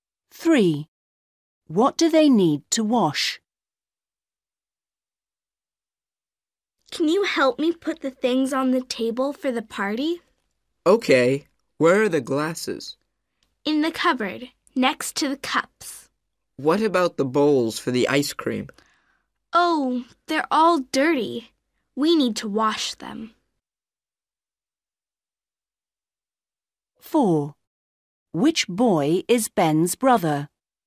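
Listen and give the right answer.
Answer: The bowls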